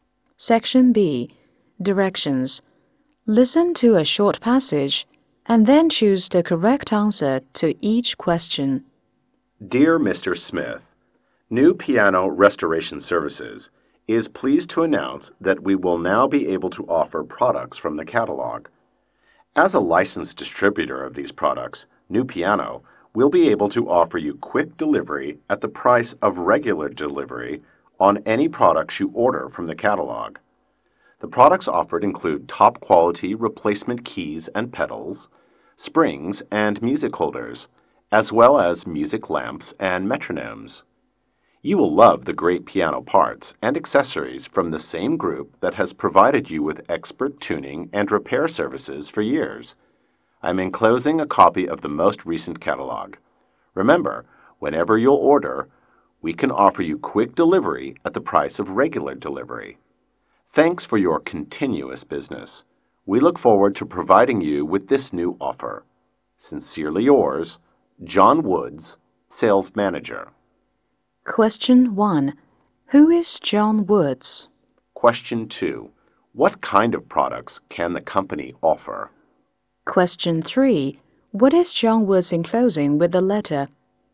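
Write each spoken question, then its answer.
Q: Who is John Woods?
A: The sales manager of New Piano Restoration Services.

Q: What kind of products can the company offer?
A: Piano parts and accessories, such as replacement keys, pedals, springs, music holders, music lamps and metronomes.

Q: What is John Woods enclosing with the letter?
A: A copy of the most recent catalog.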